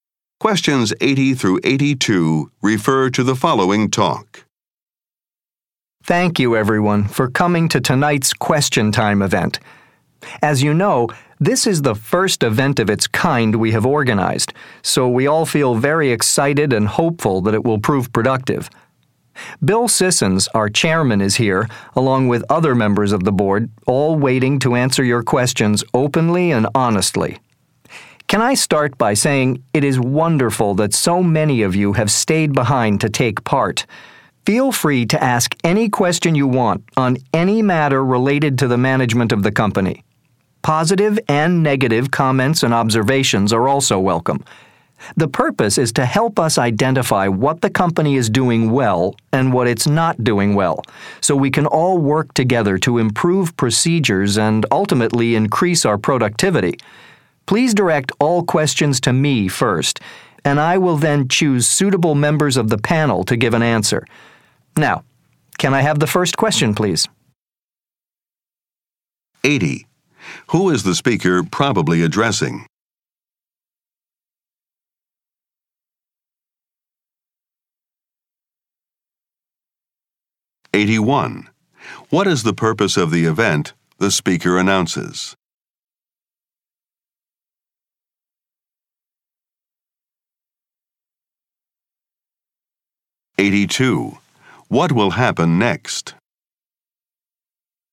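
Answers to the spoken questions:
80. Company employees
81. To find what the company does well and badly so it can improve
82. The audience will ask the first question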